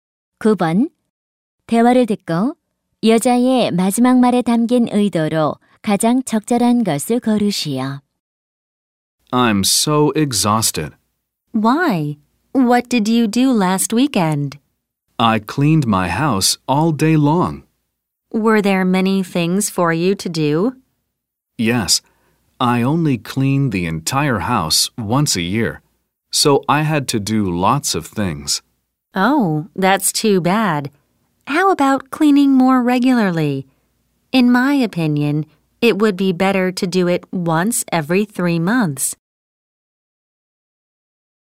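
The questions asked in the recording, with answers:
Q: 대화를 듣고 여자의 마지막 말에 담긴 의도로 가장 적절한 것을 고르시오.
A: 제안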